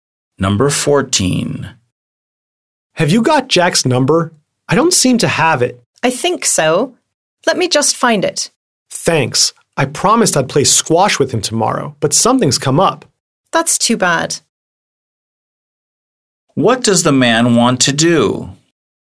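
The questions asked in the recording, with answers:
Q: What does the man want to do?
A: Get Jack's phone number so he can cancel their squash game.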